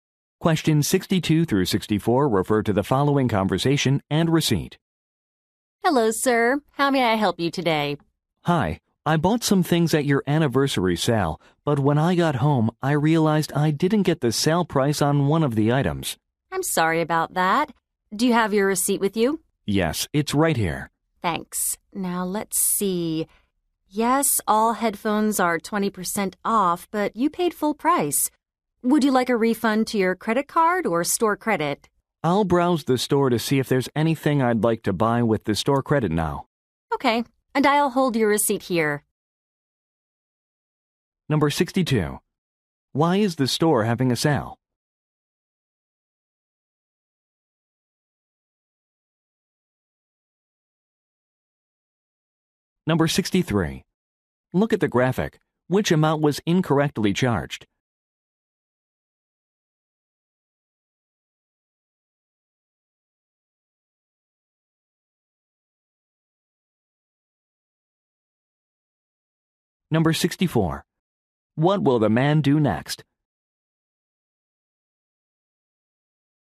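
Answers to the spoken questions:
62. For its anniversary
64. Browse the store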